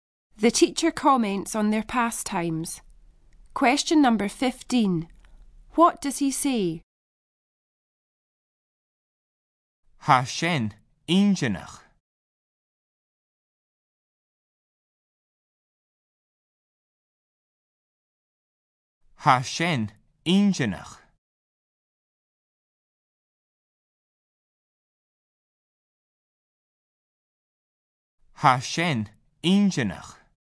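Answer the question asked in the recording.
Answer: That is interesting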